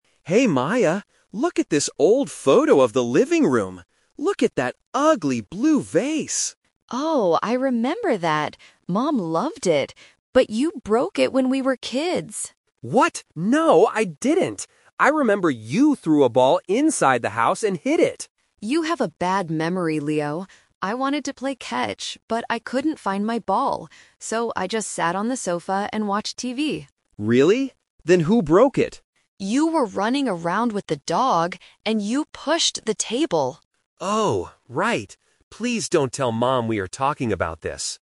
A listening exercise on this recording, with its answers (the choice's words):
Listen to a brother and sister arguing about a childhood memory. Then, read the questions below and choose the correct answer (A, B, or C) for each question.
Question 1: What did Maya actually do when the vase broke?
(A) She threw a ball.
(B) She ran around.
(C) She sat on the sofa.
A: She sat on the sofa.

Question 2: Why didn't Maya play with her ball?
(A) She couldn't find it.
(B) Her mother took it.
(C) She was too tired.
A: She couldn't find it.

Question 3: How did the vase really break?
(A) Maya hit it with a ball.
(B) Leo pushed the table.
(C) The dog jumped on the sofa.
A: Leo pushed the table.

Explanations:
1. Maya says, "So, I just sat on the sofa and watched TV." Option (A) is a trap; Leo thought she threw a ball, but she didn't. Option (B) is a trap; Leo was the one running around, not Maya.
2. Maya explains the twist by saying, "I wanted to play catch, but I couldn't find my ball." Option (B) and Option (C) are plausible reasons for not playing, but they are never mentioned in the audio.
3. Maya tells Leo the truth: "You were running around with the dog, and you pushed the table!" Option (A) is a trap; this is Leo's incorrect memory. Option (C) is a trap; the dog is mentioned because Leo was running with it, but the dog didn't jump on the sofa to break the vase.

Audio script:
Leo: Hey Maya, look at this old photo of the living room. Look at that ugly blue vase!
Maya: Oh, I remember that! Mom loved it. But you broke it when we were kids!
Leo: What? No, I didn't! I remember you threw a ball inside the house and hit it.
Maya: You have a bad memory, Leo. I wanted to play catch, but I couldn't find my ball. So, I just sat on the sofa and watched TV.
Leo: Really? Then who broke it?
Maya: You were running around with the dog, and you pushed the table!